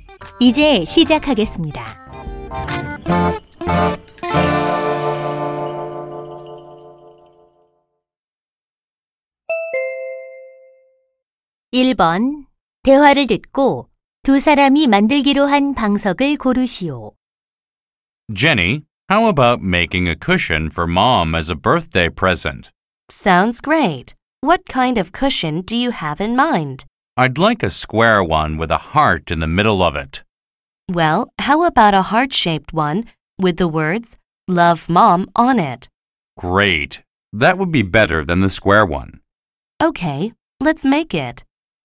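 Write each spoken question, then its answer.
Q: 대화를 듣고 두 사람이 만들기로 한 방석을 고르시오.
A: 'Love Mom'이라고 쓰인 하트 모양 방석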